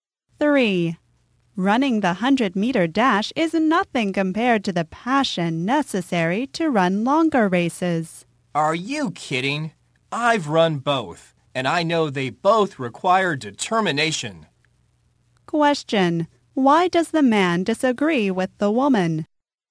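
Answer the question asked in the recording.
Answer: He has run both and knows both require determination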